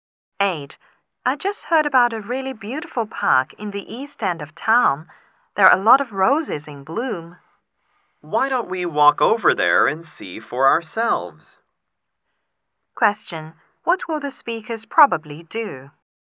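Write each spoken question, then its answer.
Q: What will the speakers probably do?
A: Walk to the park to see the roses.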